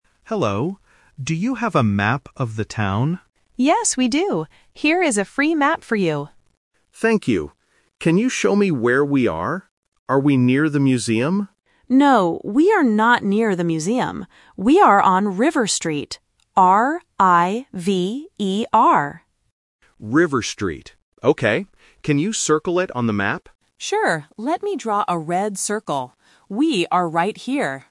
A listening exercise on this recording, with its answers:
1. What does the tourist get?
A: A free map

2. Where are they now?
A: On River Street

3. What color circle does the staff draw on the map?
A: Red